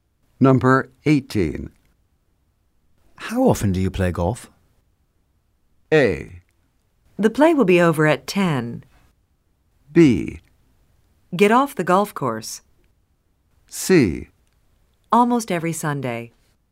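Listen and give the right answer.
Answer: C: Almost every Sunday.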